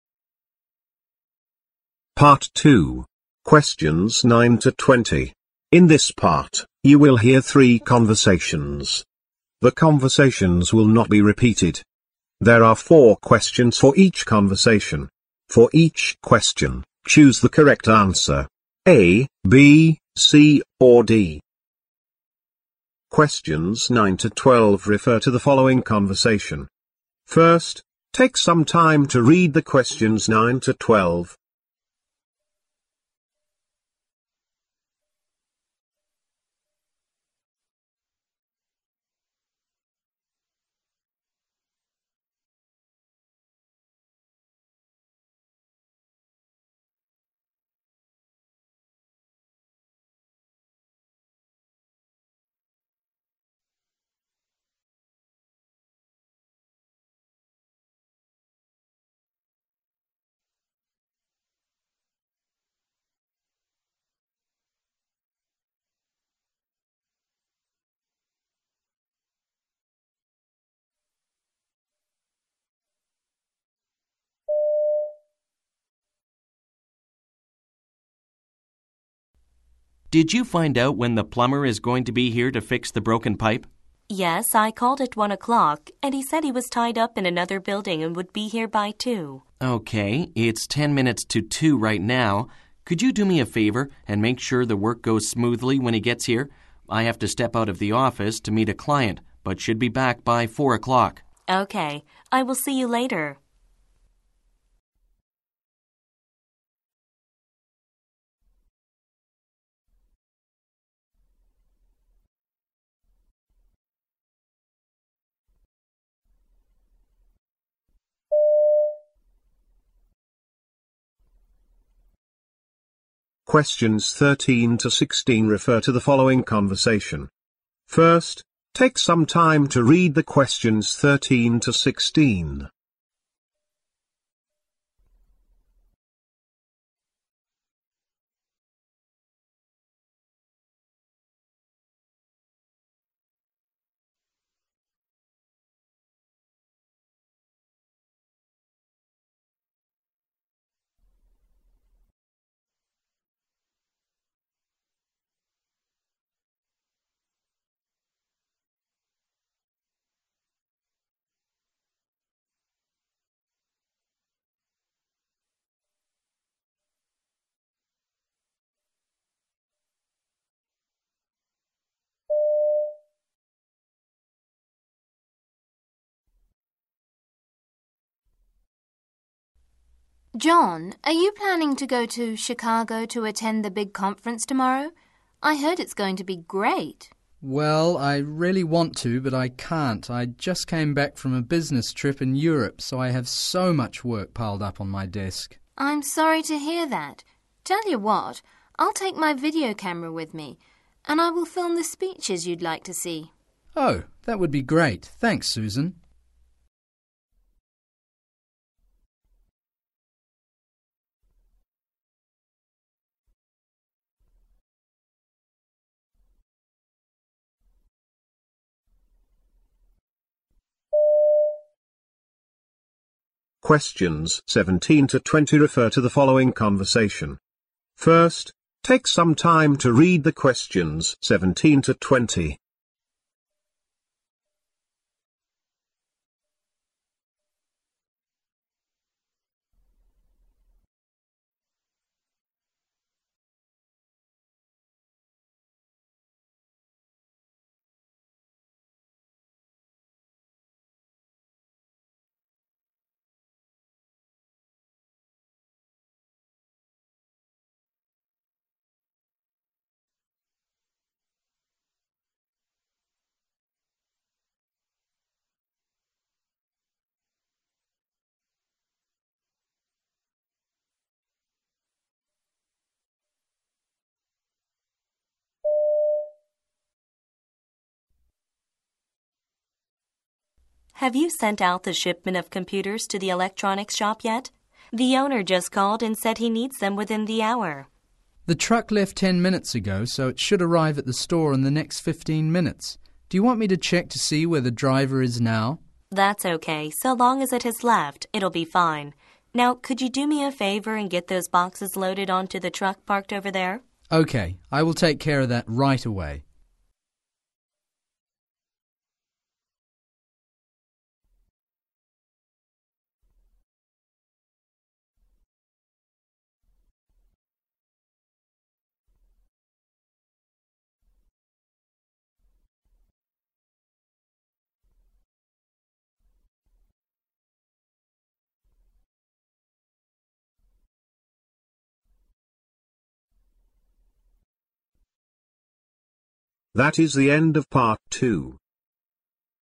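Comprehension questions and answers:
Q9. Where most likely is the plumber now?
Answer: He is working somewhere else.

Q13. When is the conference scheduled to take place?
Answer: Tomorrow

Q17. Where is the conversation most likely taking place?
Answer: In a warehouse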